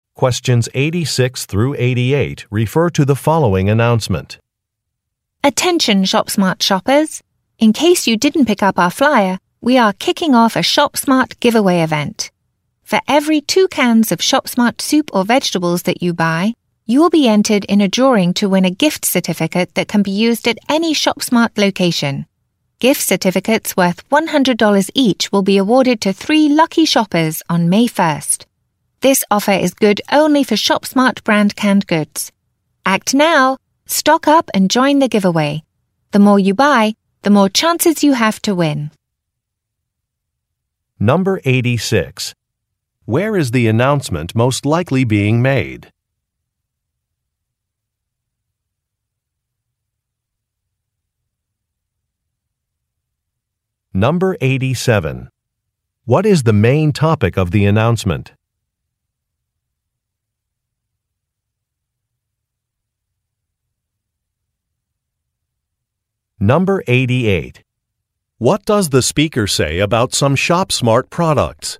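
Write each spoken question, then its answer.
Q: Where is the announcement most likely being made?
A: In a ShopSmart store (supermarket)

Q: What is the main topic of the announcement?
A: A giveaway event (prize drawing for gift certificates)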